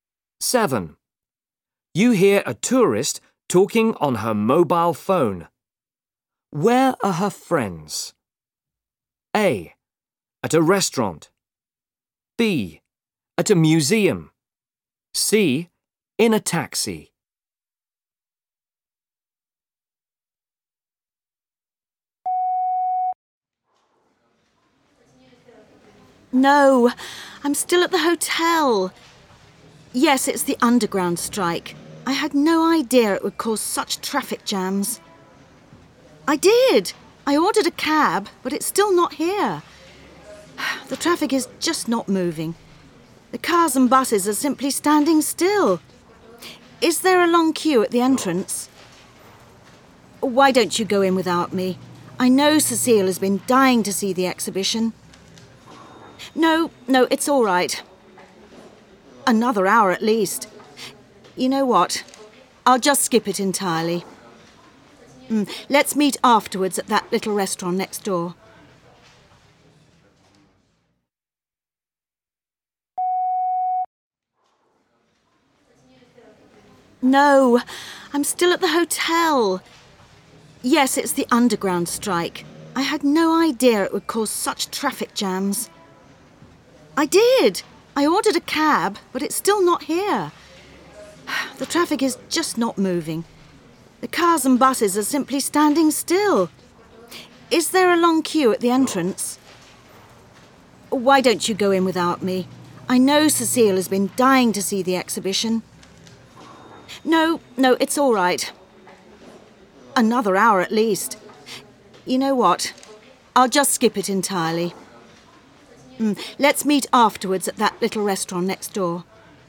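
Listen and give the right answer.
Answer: B: At a museum.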